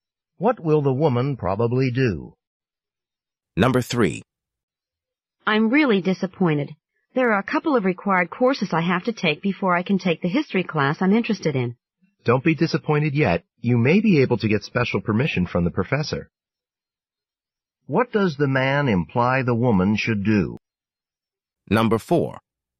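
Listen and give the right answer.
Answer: Ask the professor for special permission to take the history class.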